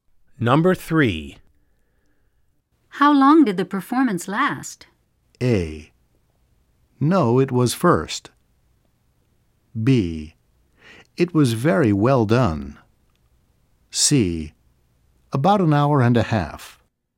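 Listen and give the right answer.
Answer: C: About an hour and a half.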